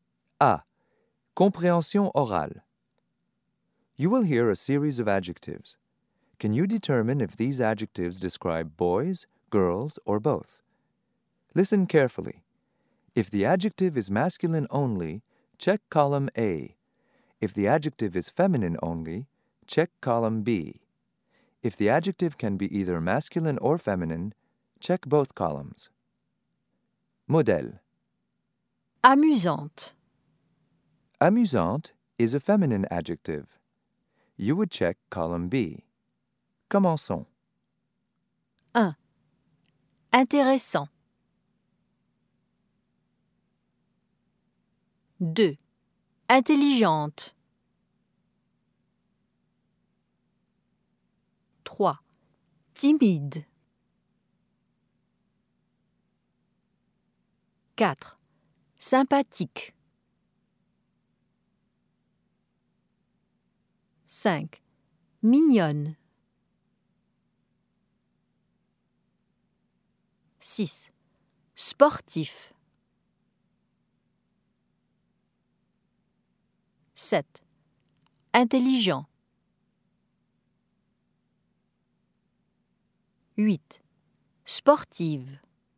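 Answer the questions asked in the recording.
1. A: masculine
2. B: feminine
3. both columns
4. both columns
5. B: feminine
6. A: masculine
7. A: masculine
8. B: feminine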